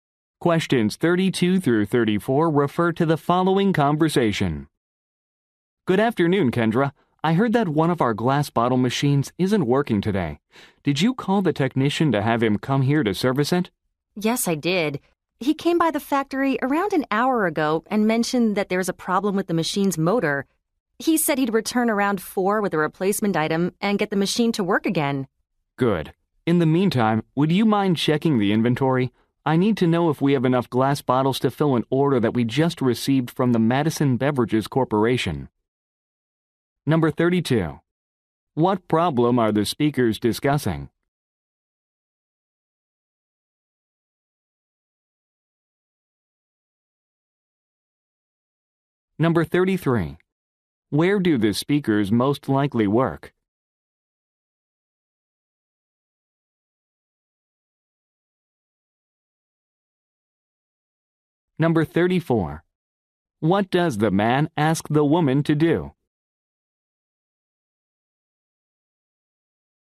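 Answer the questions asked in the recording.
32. A glass bottle machine is not working (motor problem).
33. At a glass bottle factory.
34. Check the inventory.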